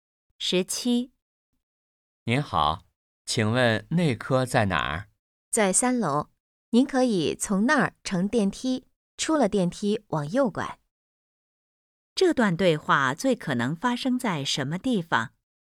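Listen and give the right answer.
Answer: 医院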